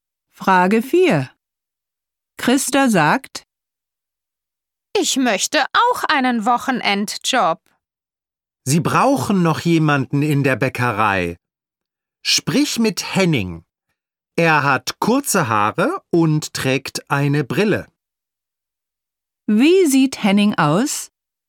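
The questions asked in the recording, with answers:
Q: Wie sieht Henning aus?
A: Er hat kurze Haare und trägt eine Brille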